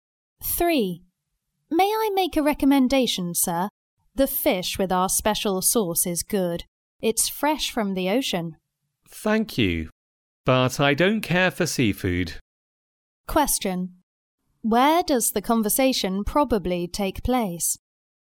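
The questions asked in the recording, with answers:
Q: Where does the conversation probably take place?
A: In a restaurant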